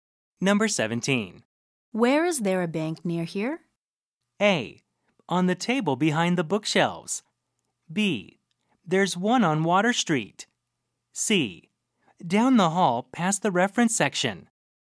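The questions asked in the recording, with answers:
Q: Where is there a bank near here?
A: B: There's one on Water Street.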